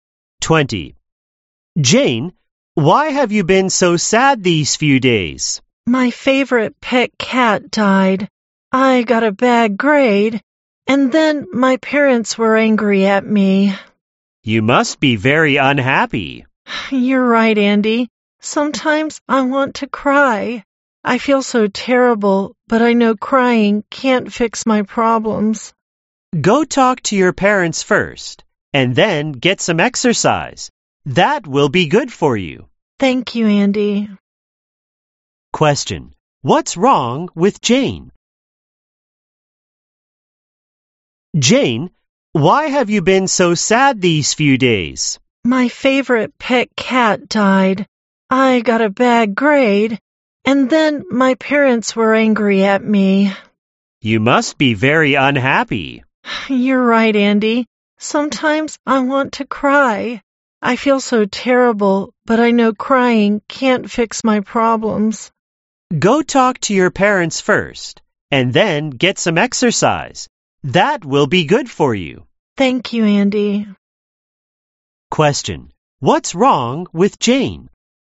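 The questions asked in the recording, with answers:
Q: what's wrong with Jane?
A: Her pet cat died, she got a bad grade, and her parents were angry at her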